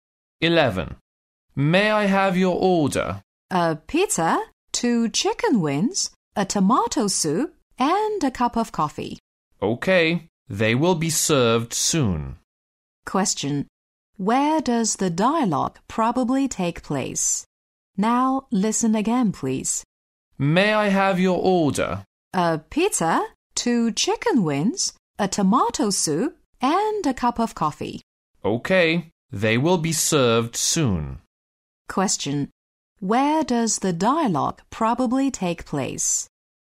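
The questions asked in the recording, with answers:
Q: Where does the dialogue probably take place?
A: In a restaurant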